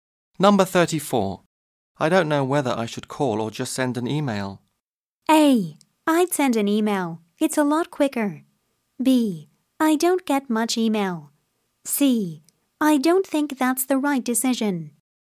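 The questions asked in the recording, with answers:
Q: I don't know whether I should call or just send an email.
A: A: I'd send an email. It's a lot quicker.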